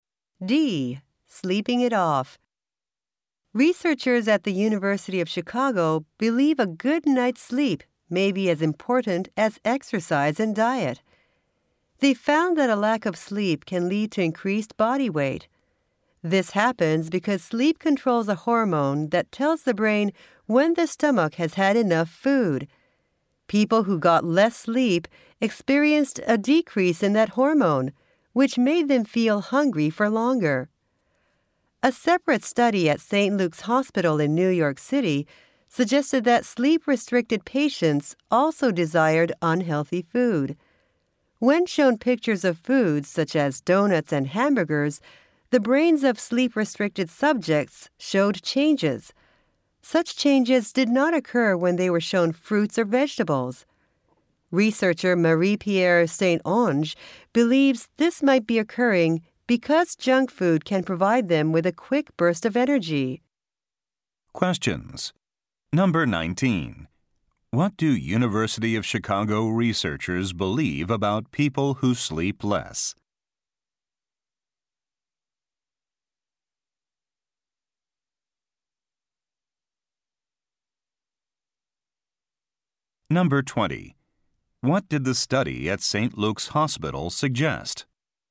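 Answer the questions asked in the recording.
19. They feel hungry for longer and gain weight
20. Sleep-deprived people desire unhealthy food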